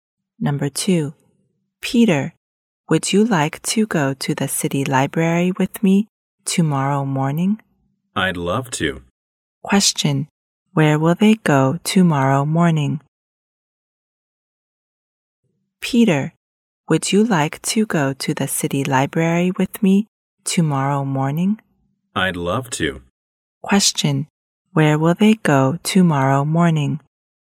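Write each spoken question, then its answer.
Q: Question.Where will they go tomorrow morning?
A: The city library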